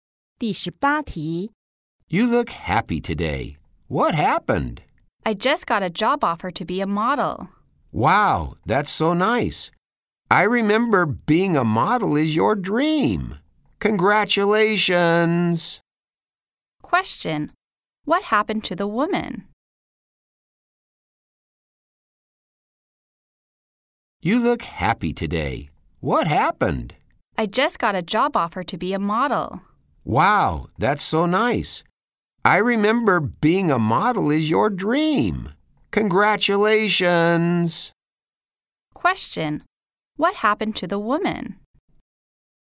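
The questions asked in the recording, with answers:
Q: What happened to the woman?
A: She got a job offer to be a model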